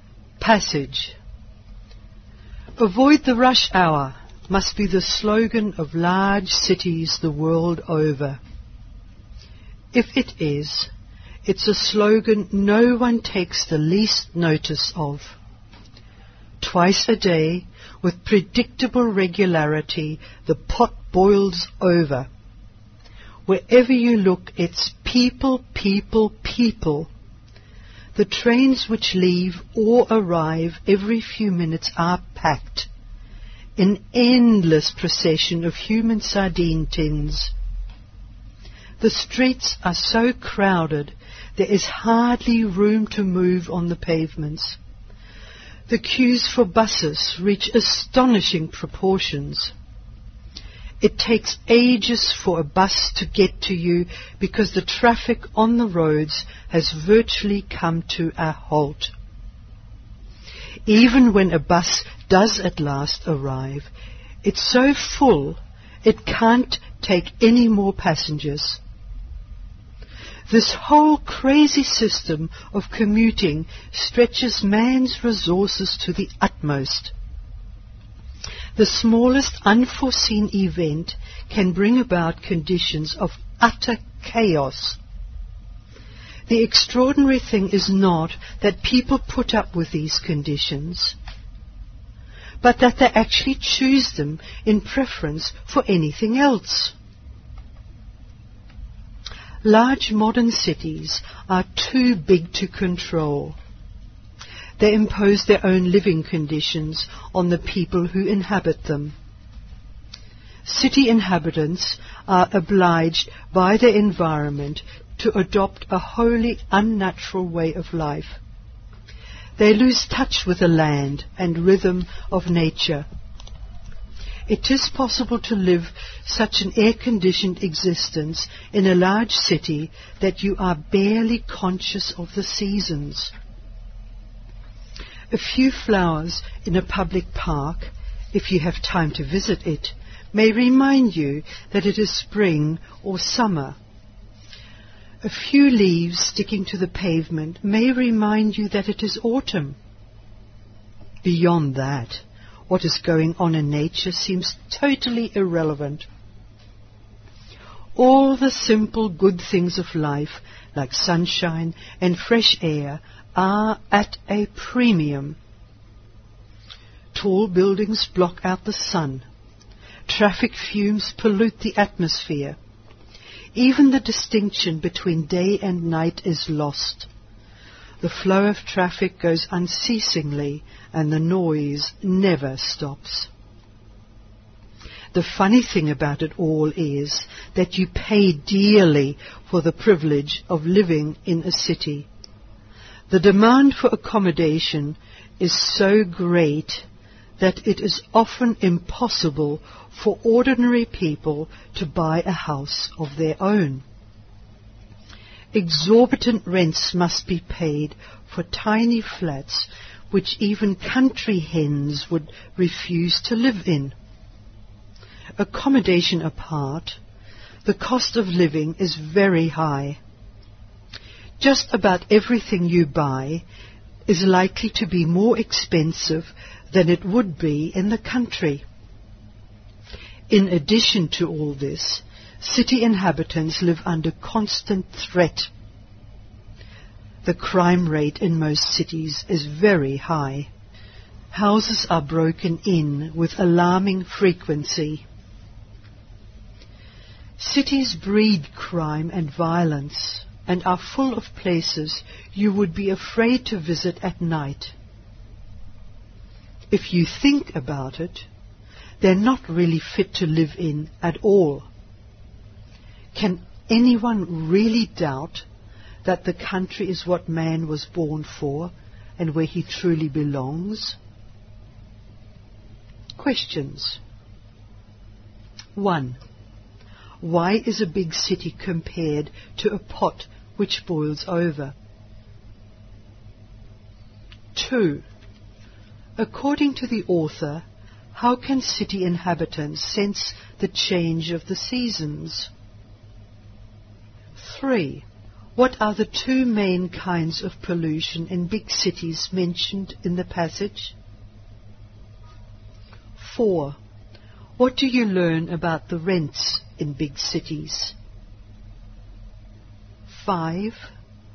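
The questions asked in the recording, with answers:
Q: Why is a big city compared to a pot which boils over?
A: Because twice a day in the rush hour it overflows with crowds of people

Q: According to the author, how can city inhabitants sense the change of the seasons?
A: From a few flowers in a public park or a few leaves sticking to the pavement

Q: What are the two main kinds of pollution in big cities mentioned in the passage?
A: Traffic fumes (air pollution) and noise

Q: What do you learn about the rents in big cities?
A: They are exorbitant, even for tiny flats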